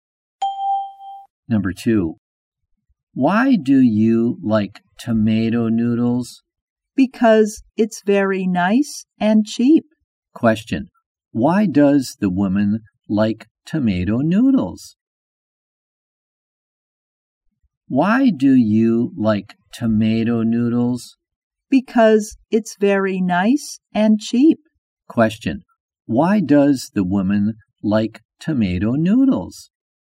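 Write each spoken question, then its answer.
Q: Why does the woman like tomato noodles?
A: Because it's very nice and cheap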